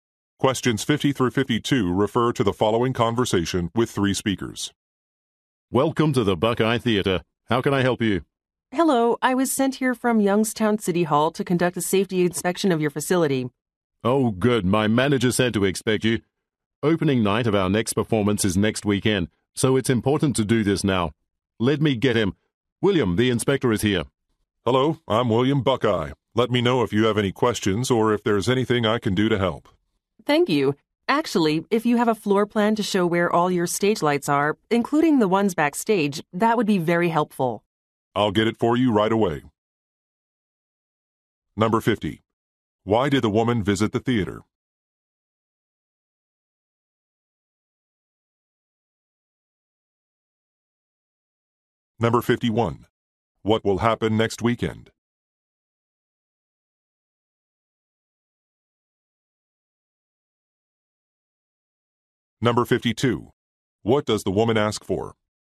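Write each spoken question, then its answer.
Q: Why did the woman visit the theater?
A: To conduct a safety inspection

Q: What will happen next weekend?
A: Opening night of a performance

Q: What does the woman ask for?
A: A floor plan showing the stage lights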